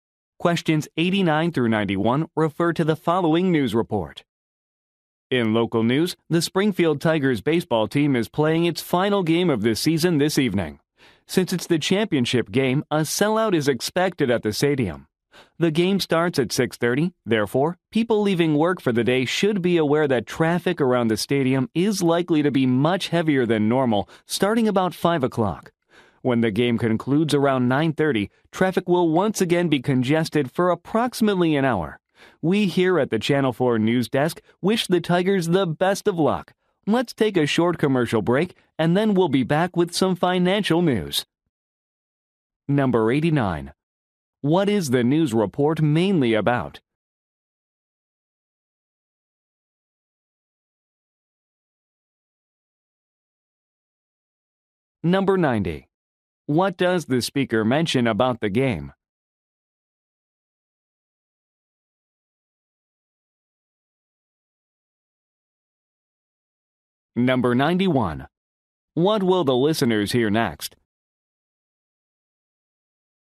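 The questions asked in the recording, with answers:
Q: What will the listeners hear next?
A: A commercial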